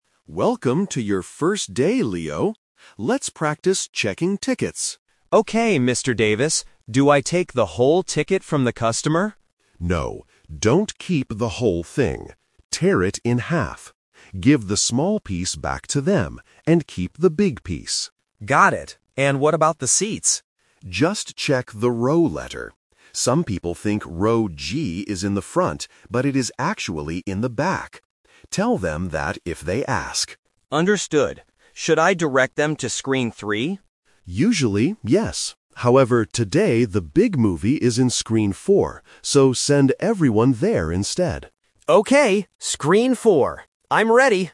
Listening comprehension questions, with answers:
Listen to the conversation and choose the correct answer (A, B, or C) for each question.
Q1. What should Leo do with the customer's ticket?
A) Keep the whole ticket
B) Tear it in half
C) Give it all back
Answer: B) Tear it in half

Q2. Where are the seats for "Row G"?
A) In the front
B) In the middle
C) In the back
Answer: C) In the back

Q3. Which room should Leo direct the customers to today?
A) Screen 3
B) Screen 4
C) Screen 5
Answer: B) Screen 4

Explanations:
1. Leo asks if he should take the whole ticket (Option A is the trap), but Mr. Davis says, "No, don't keep the whole thing. Tear it in half." Option C is not mentioned.
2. Mr. Davis explains that some people think Row G is in the front (Option A is the trap), "but it is actually in the back." Option B is not mentioned.
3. Leo asks if he should direct people to Screen 3 (Option A is the trap). Mr. Davis replies, "Usually, yes. However, today the big movie is in Screen 4." Option C is not mentioned.

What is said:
Mr. Davis: Welcome to your first day, Leo. Let's practice checking tickets.
Leo: Okay, Mr. Davis. Do I take the whole ticket from the customer?
Mr. Davis: No, don't keep the whole thing. Give the small piece back to them, and keep the big piece.
Leo: Got it. And what about the seats?
Mr. Davis: Just check the row letter. Some people think "Row G" is in the front, but it is actually in the back. Tell them that if they ask.
Leo: Understood. Should I direct them to Screen 3?
Mr. Davis: Usually, yes. However, today the big movie is in Screen 4. So, send everyone there instead.

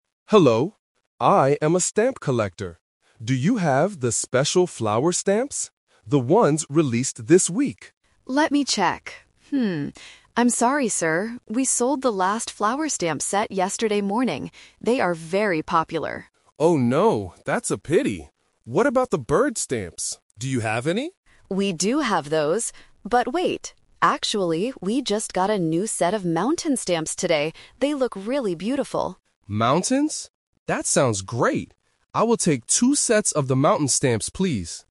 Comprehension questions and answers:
Listen to a conversation between a stamp collector and a postal worker. Choose the correct answer (A, B, or C).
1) What kind of stamps does the man want to buy at first?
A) Bird stamps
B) Flower stamps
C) Mountain stamps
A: B) Flower stamps

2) Why can't the man buy his first choice?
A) The post office sold all of them.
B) They are too expensive for him.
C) They will be released next week.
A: A) The post office sold all of them.

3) What does the man finally buy?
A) One set of bird stamps.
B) Two sets of flower stamps.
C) Two sets of mountain stamps.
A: C) Two sets of mountain stamps.

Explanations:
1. At the beginning, Mr. Harris asks: "Do you have the special flower stamps?"
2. The clerk explains why he can't buy them: "We sold the last flower stamp set yesterday morning."
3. Mr. Harris agrees to the clerk's suggestion and says: "I will take two sets of the mountain stamps, please."

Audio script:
Harris: Hello. I am a stamp collector. Do you have the special flower stamps? The ones released this week.
Clerk: Let me check. I'm sorry, sir. We sold the last flower stamp set yesterday morning. They are very popular.
Mr. Harris: Oh no, that's a pity. What about the bird stamps? Do you have any?
Clerk: We do have those. But wait... actually, we just got a new set of mountain stamps today. They look really beautiful.
Harris: Mountains? That sounds great. I will take two sets of the mountain stamps, please.

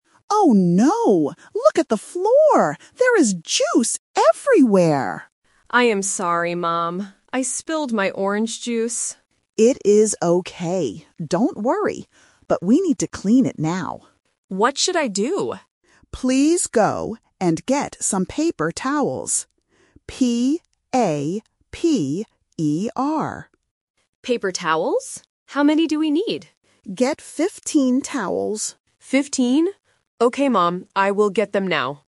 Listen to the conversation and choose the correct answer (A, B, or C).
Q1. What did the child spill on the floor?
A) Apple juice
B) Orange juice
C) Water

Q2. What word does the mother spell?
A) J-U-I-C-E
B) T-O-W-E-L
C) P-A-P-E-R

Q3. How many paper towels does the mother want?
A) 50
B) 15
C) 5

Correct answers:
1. B) Orange juice
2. C) P-A-P-E-R
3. B) 15

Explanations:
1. The child explicitly says, "I spilled my orange juice." Why the trap is wrong: "Apple juice" (A) and "Water" (C) are common drinks, but they are not mentioned in the audio.
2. The mother asks for paper towels and clearly spells the word: "P-A-P-E-R". Why the trap is wrong: "Juice" (A) and "Towel" (B) are words used in the script, but the mother does not spell them.
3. The mother says "Get 15 towels," and the child repeats "15?" to confirm. Why the trap is wrong: 50 (A) is a classic A1 sound trap because "fifteen" and "fifty" sound very similar. 5 (C) is a part of the number 15 but is not the correct answer.

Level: A1

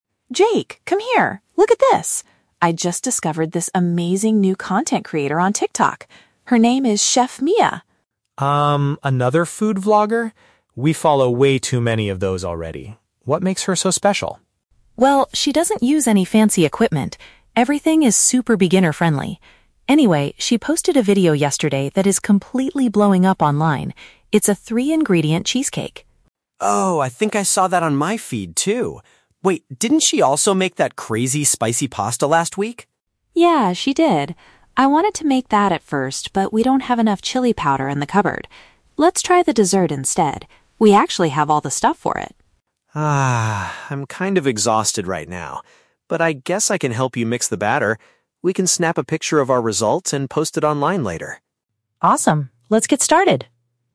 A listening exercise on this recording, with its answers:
Listen to a conversation between a brother and sister. For each question, choose the correct answer (A, B, or C).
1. What does Emma like about the new online creator?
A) She uses highly professional kitchen tools.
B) Her cooking methods are easy for novices to follow.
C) She only posts videos about main courses.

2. Which dish do the siblings finally decide to prepare?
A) A popular sweet treat.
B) A hot and spicy noodle dish.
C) A complex chocolate cake.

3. How does Jake feel about helping his sister at first?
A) He is eager to record a video for his own channel.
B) He completely refuses to participate in the cooking.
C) He is a bit reluctant because he lacks energy.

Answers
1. B) Her cooking methods are easy for novices to follow.
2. A) A popular sweet treat.
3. C) He is a bit reluctant because he lacks energy.

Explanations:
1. Emma says that the creator's videos are "super beginner-friendly", which means they are easy for novices (beginners) to follow. Option (A) is a trap; Emma explicitly says the creator "doesn't use any fancy equipment." Option (C) is a trap; she makes desserts like cheesecake, not just main courses.
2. Emma suggests making the "dessert" (a sweet treat) which is a cheesecake that is "blowing up" (popular/viral). Option (B) is a trap; Jake mentions the "spicy pasta" (hot noodle dish), and Emma wanted to make it at first, but they changed their mind because they don't have chili powder. Option (C) is plausible but never mentioned in the audio.
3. Jake hesitates and says "Ah, I'm kind of exhausted right now" (which means he lacks energy and is reluctant), but he finally agrees to help mix the batter. Option (A) is a trap; he mentions posting a picture later, but he is not eager at first. Option (B) is incorrect because he does not completely refuse; he agrees to help.

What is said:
Emma: Jake, come here! Look at this. I just discovered this amazing new content creator on TikTok. Her name is Chef Mia.
Jake: Um, another food vlogger? We follow way too many of those already. What makes her so special?
Emma: Well, she doesn't use any fancy equipment. Everything is super beginner-friendly. Anyway, she posted a video yesterday that is completely blowing up online. It's a three-ingredient cheesecake.
Jake: Oh, I think I saw that on my feed too! Wait, didn't she also make that crazy spicy pasta last week?
Emma: Yeah, she did. I wanted to make that at first, but we don't have enough chili powder in the cupboard. Let's try the dessert instead! We actually have all the stuff for it.
Jake: Ah, I'm kind of exhausted right now... but I guess I can help you mix the batter. We can snap a picture of our result and post it online later!
Emma: Awesome. Let's get started.

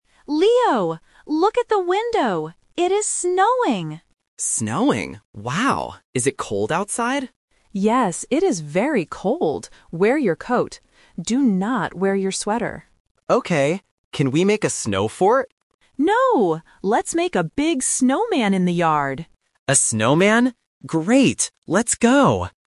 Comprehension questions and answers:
Listen to the conversation. Circle the correct answer (A, B, or C).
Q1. What is the weather like?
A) Raining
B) Snowing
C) Sunny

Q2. What must Leo wear?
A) A coat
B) A sweater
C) A scarf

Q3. What will they make in the yard?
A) A snow fort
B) A snowball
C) A snowman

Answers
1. B) Snowing
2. A) A coat
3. C) A snowman

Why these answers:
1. The Key: Mia says clearly at the beginning, "It is snowing!" The Trap: Option (A) "Raining" and Option (C) "Sunny" are weather words, but they are not mentioned in the audio.
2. The Key: Mia tells Leo, "Wear your coat" . The Trap: Option (B) "A sweater" is mentioned in the audio, but Mia rejects it by saying "Do not wear your sweater". Not Mentioned: Option (C) "A scarf" is completely new information.
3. The Key: Mia says, "let's make a big snowman in the yard!" and Leo agrees. The Trap: Option (A) "A snow fort" is mentioned by Leo because he wants to make it, but Mia says "No". Not Mentioned: Option (B) "A snowball" is never mentioned.

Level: A1

